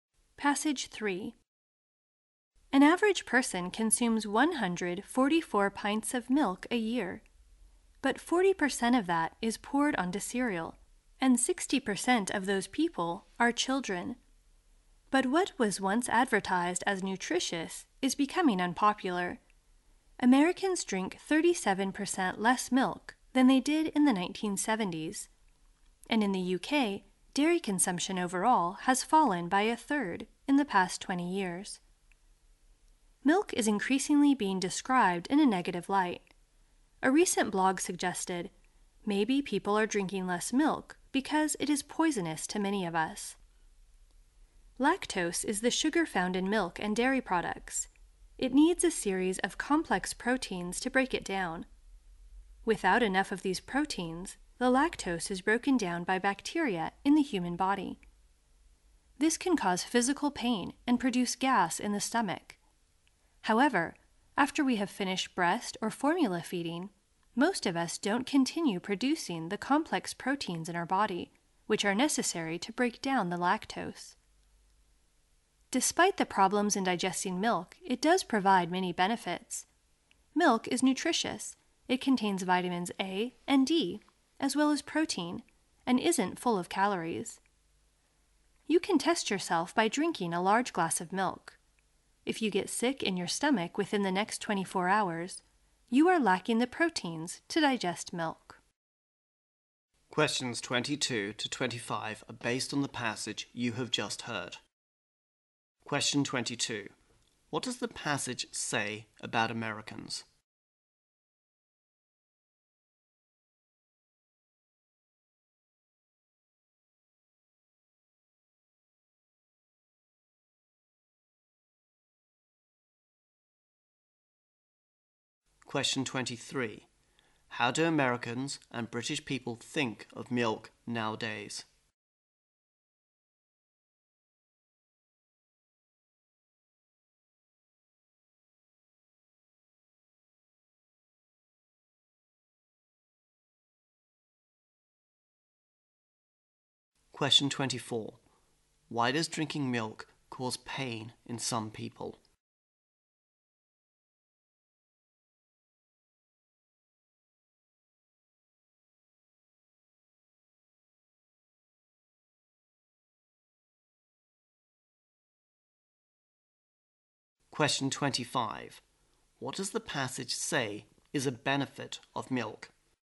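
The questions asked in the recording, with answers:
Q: What does the passage say about Americans?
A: They drink 37% less milk than in the 1970s

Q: How do Americans and British people think of milk nowadays?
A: More negatively; it's becoming unpopular

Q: Why does drinking milk cause pain in some people?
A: They lack the proteins needed to break down lactose

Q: What does the passage say is a benefit of milk?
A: It is nutritious, with vitamins A and D and protein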